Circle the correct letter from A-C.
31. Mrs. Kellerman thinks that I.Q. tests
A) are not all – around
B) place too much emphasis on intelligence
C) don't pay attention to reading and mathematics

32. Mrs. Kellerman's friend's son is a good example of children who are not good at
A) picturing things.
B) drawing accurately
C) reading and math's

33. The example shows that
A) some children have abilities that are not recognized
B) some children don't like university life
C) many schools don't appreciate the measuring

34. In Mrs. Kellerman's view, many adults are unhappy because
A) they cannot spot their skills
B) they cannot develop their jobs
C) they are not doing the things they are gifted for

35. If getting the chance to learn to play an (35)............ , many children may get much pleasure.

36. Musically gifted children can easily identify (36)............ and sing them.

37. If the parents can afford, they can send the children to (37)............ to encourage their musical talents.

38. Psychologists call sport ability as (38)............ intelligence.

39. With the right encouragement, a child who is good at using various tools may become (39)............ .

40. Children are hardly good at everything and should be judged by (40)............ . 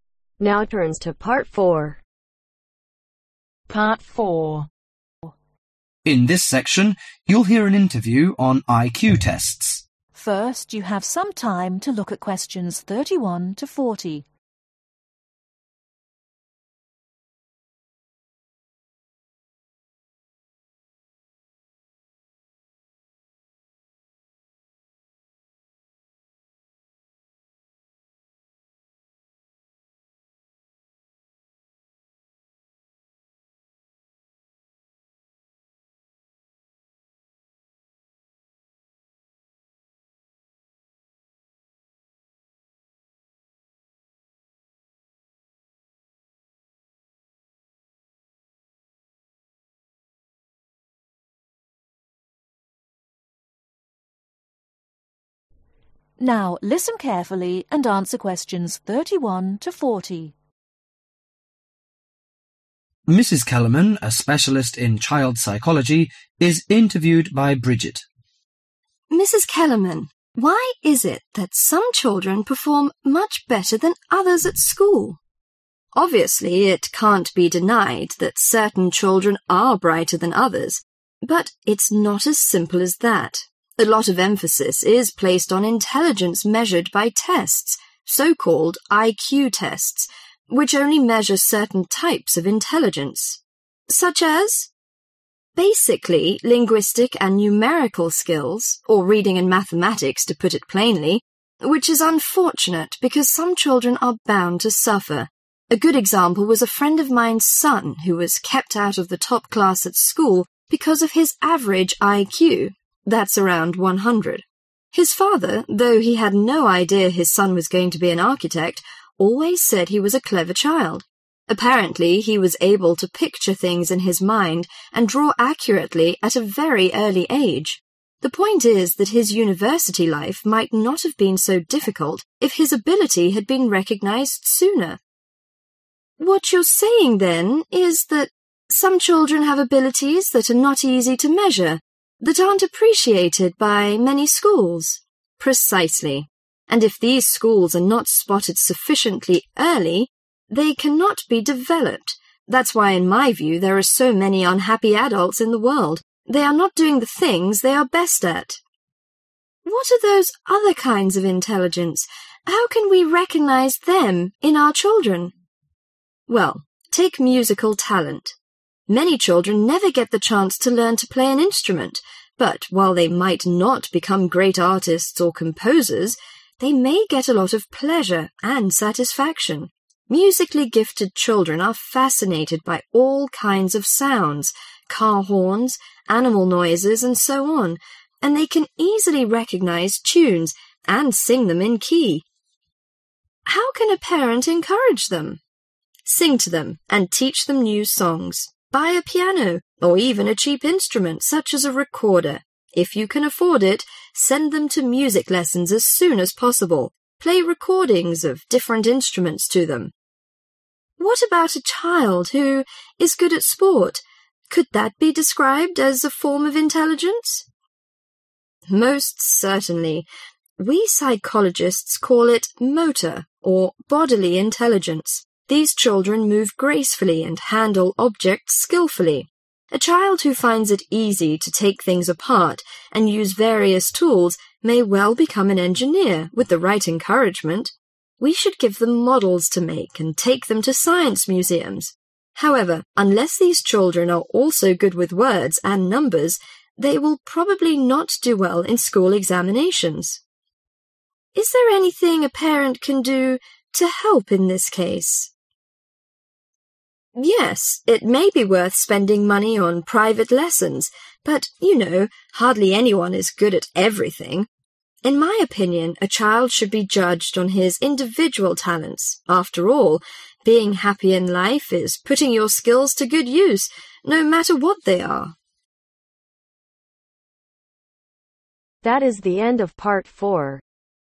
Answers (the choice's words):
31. are not all – around
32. reading and math's
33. some children have abilities that are not recognized
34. they are not doing the things they are gifted for
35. Instruments
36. Tunes
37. Music Lessons
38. Motor / Bodily
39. Engineer
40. Individual Talents